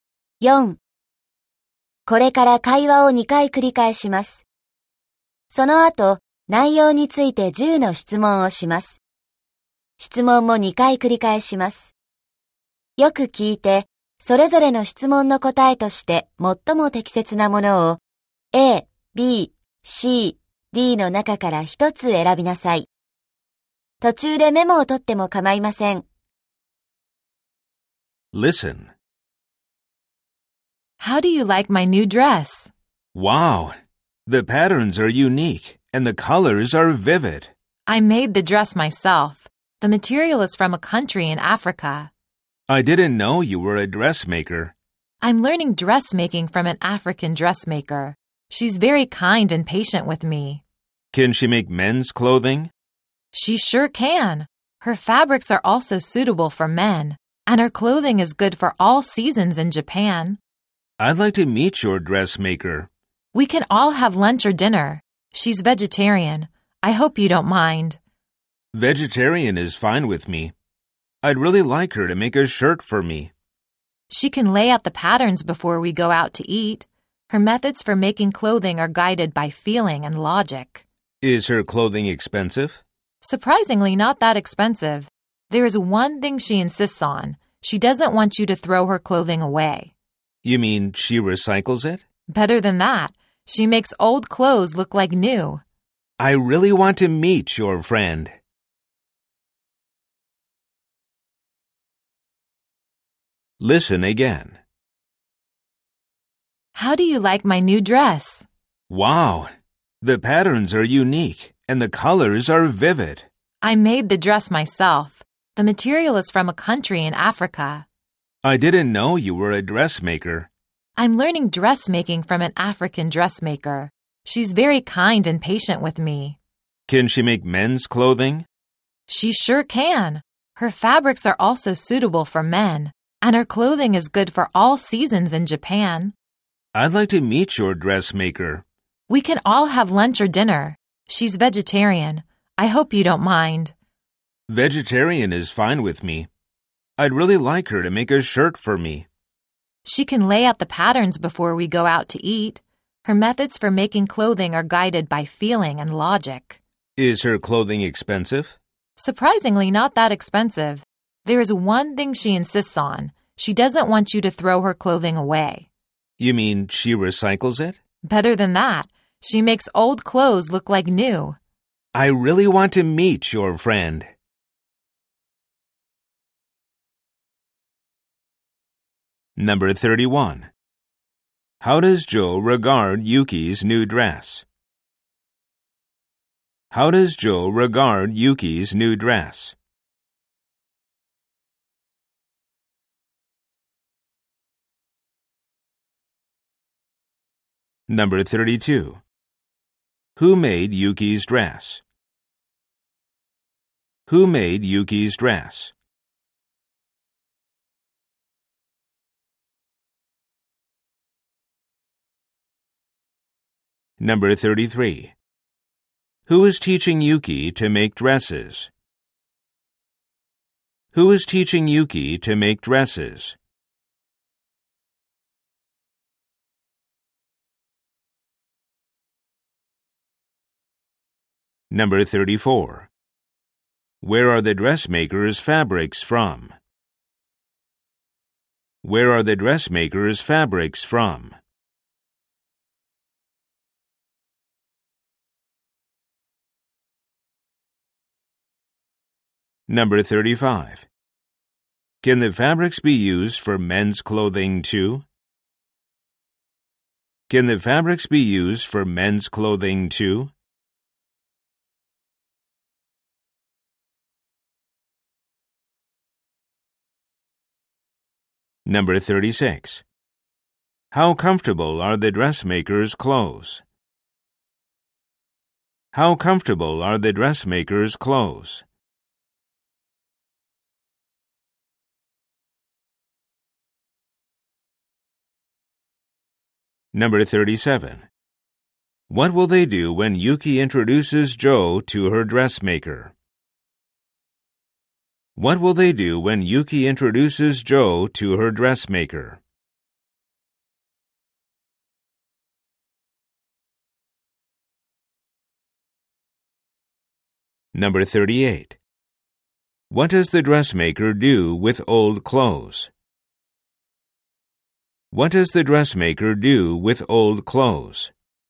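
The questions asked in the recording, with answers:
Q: How does Joe regard Yuki's new dress?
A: The patterns are unique and the colors vivid.

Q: Who made Yuki's dress?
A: Yuki herself

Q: Who is teaching Yuki to make dresses?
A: An African dressmaker

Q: Where are the dressmaker's fabrics from?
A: A country in Africa

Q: Can the fabrics be used for men's clothing too?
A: Yes

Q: How comfortable are the dressmaker's clothes?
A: Good for all seasons in Japan

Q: What will they do when Yuki introduces Joe to her dressmaker?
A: Have lunch or dinner together

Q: What does the dressmaker do with old clothes?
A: Makes them look like new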